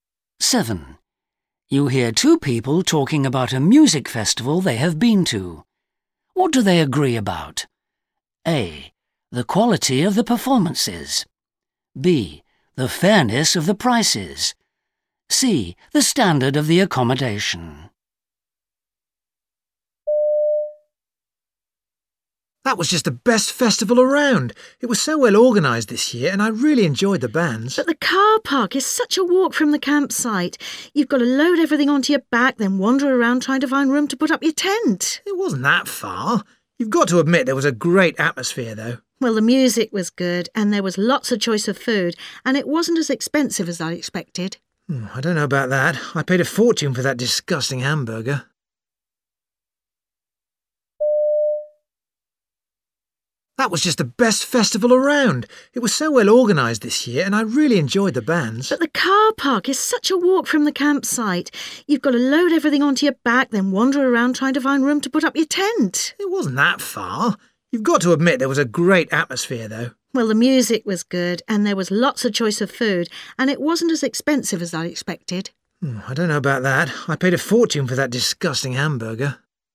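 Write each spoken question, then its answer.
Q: What do they agree about?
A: A: The quality of the performances.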